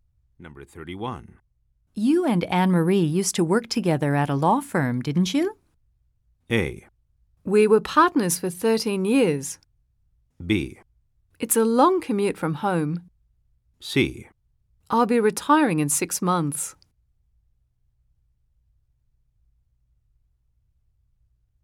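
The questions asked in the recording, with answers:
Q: You and Anne-Marie used to work together at a law firm, didn't you?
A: A: We were partners for 13 years.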